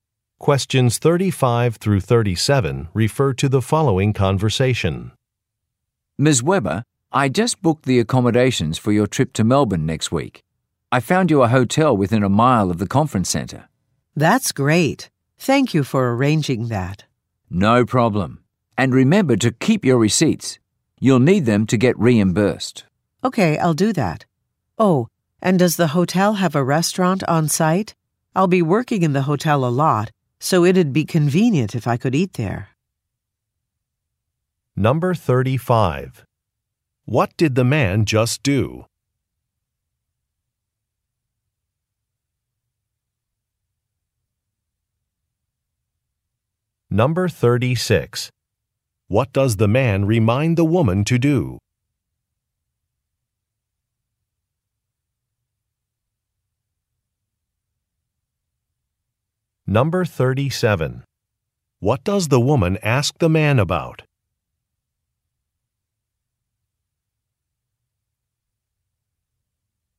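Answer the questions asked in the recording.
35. Booked hotel accommodations for her trip
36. Keep her receipts
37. Whether the hotel has a restaurant on site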